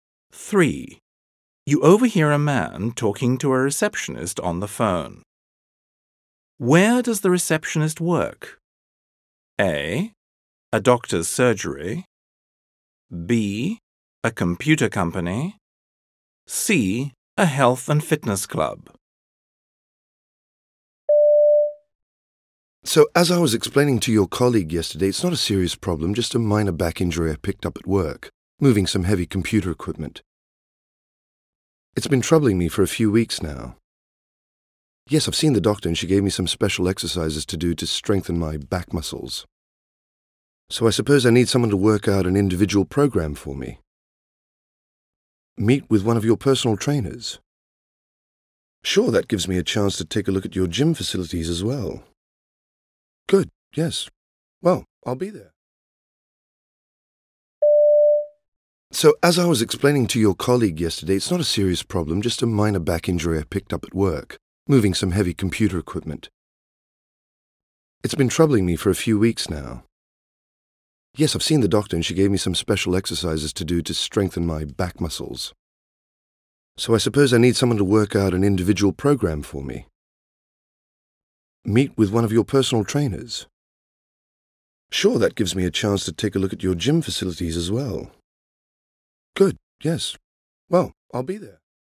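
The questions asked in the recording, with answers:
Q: Where does the receptionist work?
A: C: A health and fitness club.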